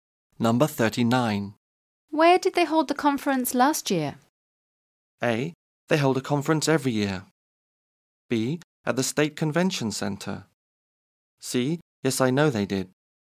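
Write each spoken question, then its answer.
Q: Where did they hold the conference last year?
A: B: At the State Convention Center.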